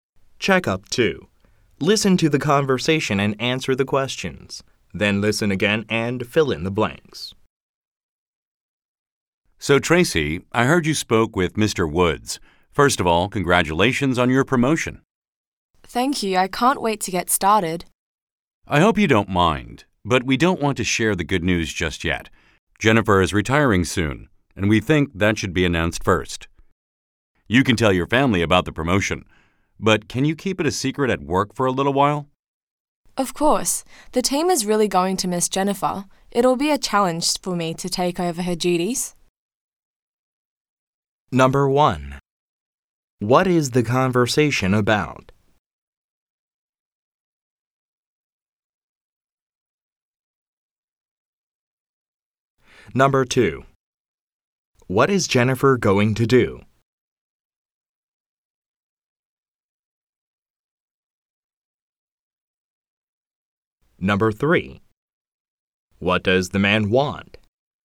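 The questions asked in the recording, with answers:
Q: What is the conversation about?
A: Tracy's promotion

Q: What is Jennifer going to do?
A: Retire soon

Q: What does the man want?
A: For Tracy to keep her promotion a secret at work for a while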